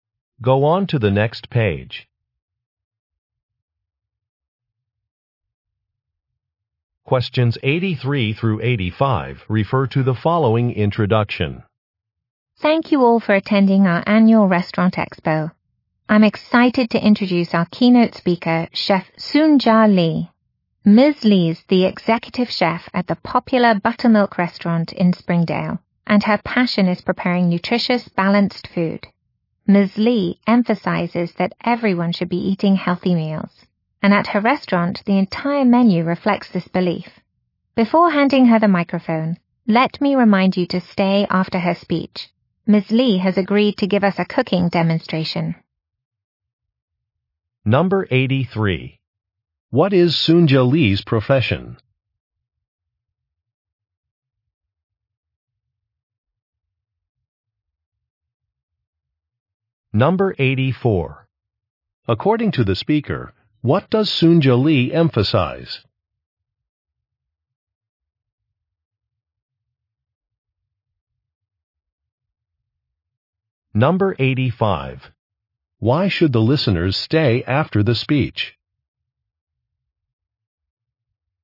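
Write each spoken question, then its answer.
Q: What is Soonja Lee's profession?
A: Chef

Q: According to the speaker, what does Soonja Lee emphasize?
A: Eating healthy meals

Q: Why should the listeners stay after the speech?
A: To see a cooking demonstration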